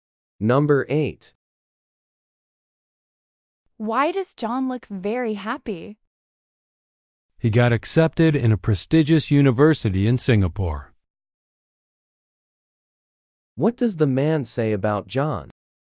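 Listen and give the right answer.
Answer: He was accepted at a prestigious university in Singapore.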